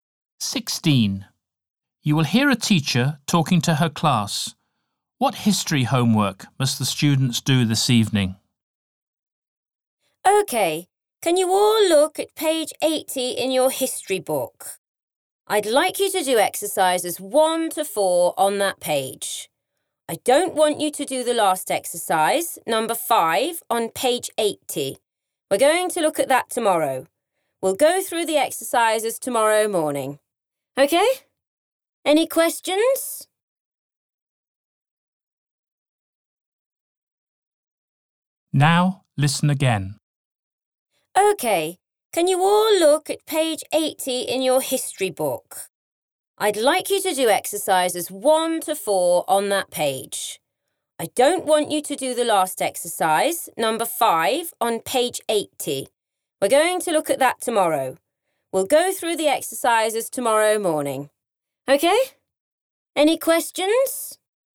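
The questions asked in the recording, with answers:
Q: What history homework must the students do this evening?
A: exercises 1 to 4 on page 80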